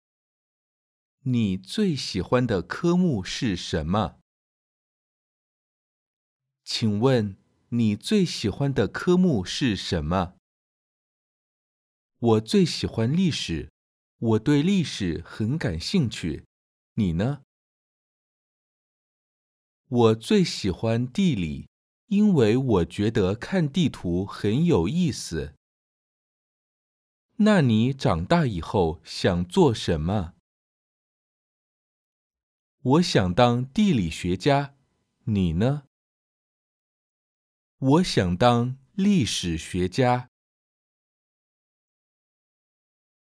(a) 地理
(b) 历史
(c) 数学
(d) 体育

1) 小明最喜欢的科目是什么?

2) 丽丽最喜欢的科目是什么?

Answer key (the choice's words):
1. 历史
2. 地理

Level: beginner